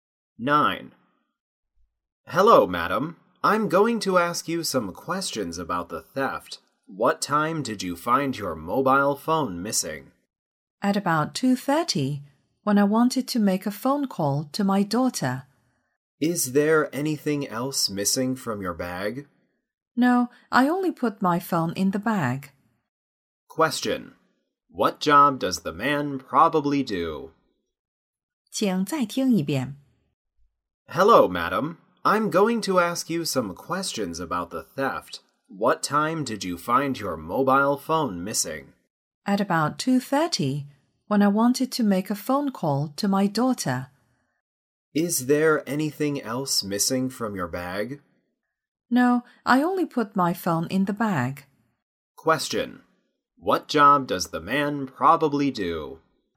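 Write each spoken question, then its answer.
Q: Question. What job does the man probably do?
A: A police officer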